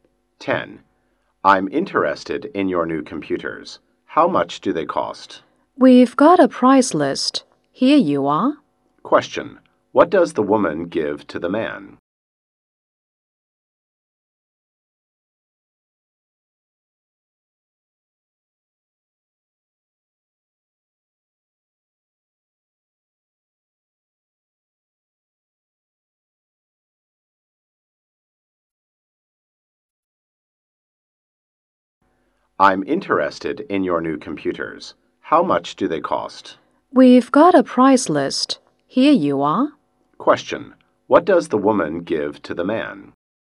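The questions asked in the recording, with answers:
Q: Question. What does the woman give to the man?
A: A price list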